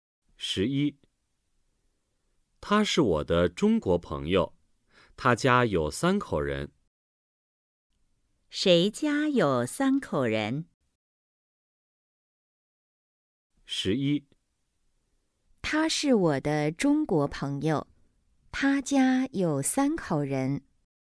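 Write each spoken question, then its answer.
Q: 谁家有三口人?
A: 我的中国朋友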